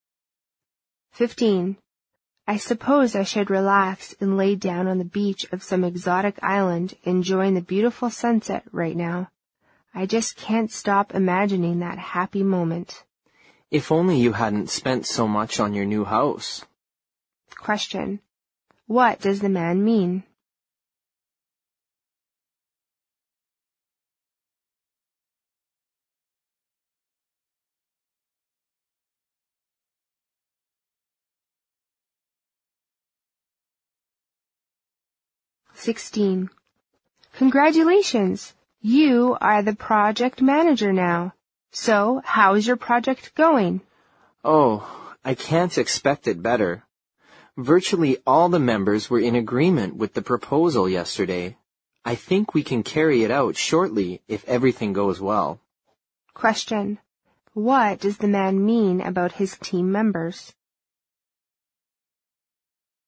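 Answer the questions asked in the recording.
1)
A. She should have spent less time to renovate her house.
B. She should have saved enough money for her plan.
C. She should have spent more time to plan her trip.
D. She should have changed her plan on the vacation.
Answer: B. She should have saved enough money for her plan.
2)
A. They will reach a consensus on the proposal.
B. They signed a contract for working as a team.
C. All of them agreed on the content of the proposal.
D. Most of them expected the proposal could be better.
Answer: C. All of them agreed on the content of the proposal.

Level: 六级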